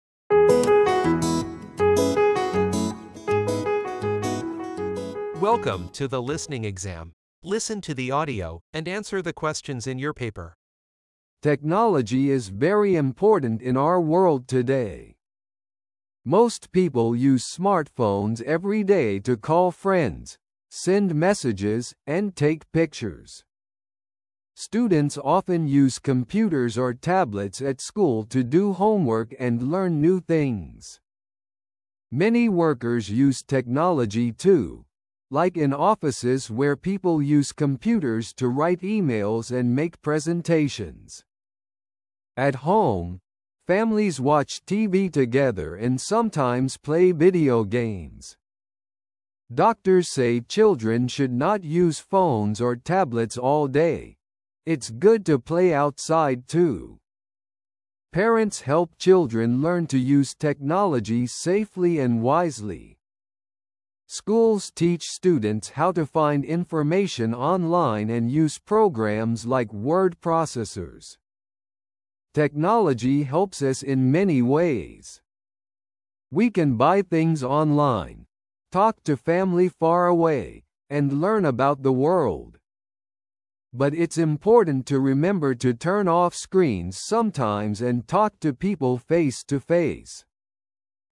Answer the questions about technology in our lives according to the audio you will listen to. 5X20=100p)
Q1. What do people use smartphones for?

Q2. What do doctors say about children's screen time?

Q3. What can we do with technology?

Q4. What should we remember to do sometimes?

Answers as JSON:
{"1": "Call friends, send messages.", "2": "Children should not use phones or tablets all day.", "3": "Shop online, talk to family.", "4": "Turn off screens."}

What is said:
Technology is very important in our world today. Most people use smartphones every day to call friends, send messages, and take pictures. Students often use computers or tablets at school to do homework and learn new things. Many workers use technology too, like in offices where people use computers to write emails and make presentations.
At home, families watch TV together and sometimes play video games. Doctors say children should not use phones or tablets all day – it's good to play outside too. Parents help children learn to use technology safely and wisely. Schools teach students how to find information online and use programs like word processors.
Technology helps us in many ways: we can buy things online, talk to family far away, and learn about the world. But it's important to remember to turn off screens sometimes and talk to people face-to-face.

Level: 10.Sınıf